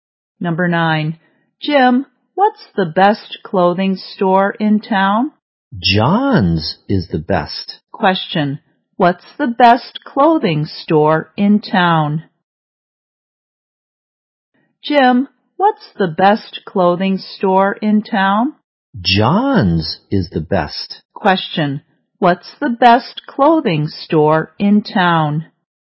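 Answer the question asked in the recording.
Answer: John's.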